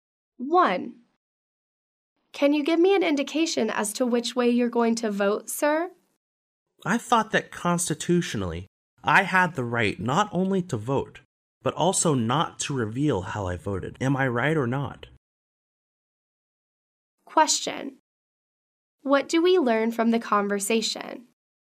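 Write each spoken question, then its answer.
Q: What do we learn from the conversation?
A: The man doesn't want to say how he will vote.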